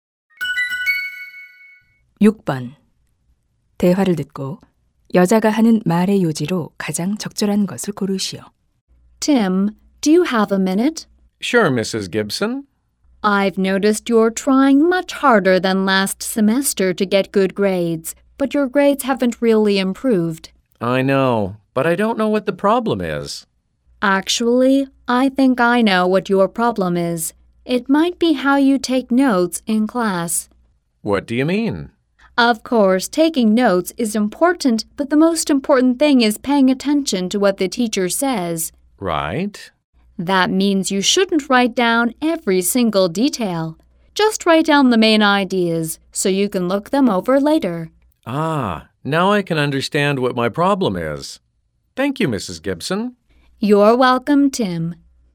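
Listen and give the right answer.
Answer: 수업 중 필기는 세부사항이 아닌 요점만 적어야 한다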